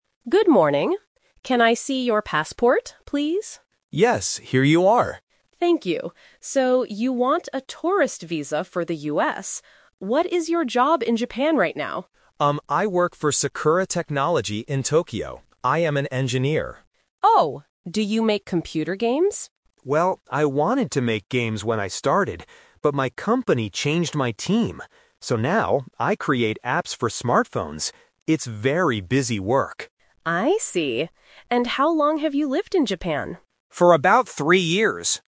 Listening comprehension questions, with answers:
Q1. Why is the applicant talking to the officer?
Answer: To get a tourist visa.

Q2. What does the applicant make at his job now?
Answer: Smartphone apps.

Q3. How long has the applicant lived in Japan?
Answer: Three years.

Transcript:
Officer: Good morning. Can I see your passport, please?
Applicant: Yes, here you are.
Officer: Thank you. So, you want a tourist visa for the US. What is your job in Japan right now?
Applicant: Um, I work for Sakura Technology in Tokyo. I am an engineer.
Officer: Oh, do you make computer games?
Applicant: Well, I wanted to make games when I started. But my company changed my team. So now, I create apps for smartphones. It's very busy work.

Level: A2